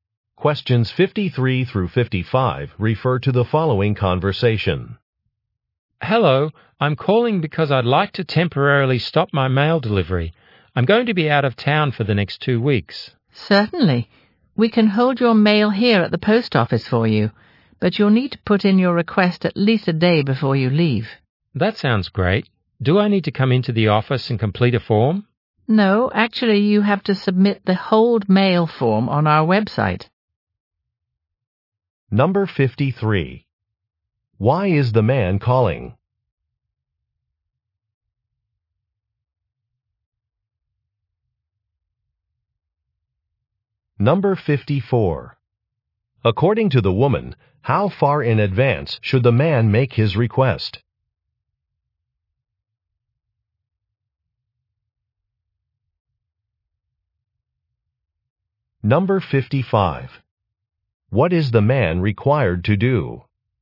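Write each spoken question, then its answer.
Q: Why is the man calling?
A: To stop his mail delivery temporarily

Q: According to the woman, how far in advance should the man make his request?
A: At least a day before he leaves

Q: What is the man required to do?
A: Submit a form on the website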